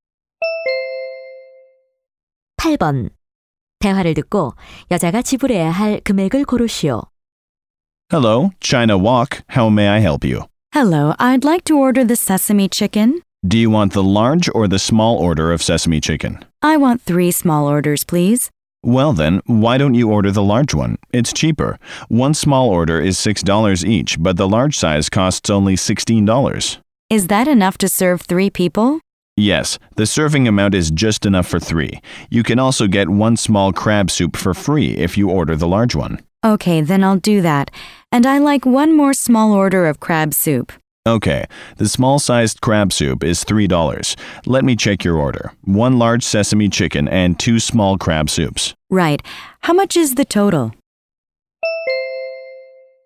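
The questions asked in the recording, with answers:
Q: 대화를 듣고 여자가 지불해야 할 금액을 고르시오.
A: $19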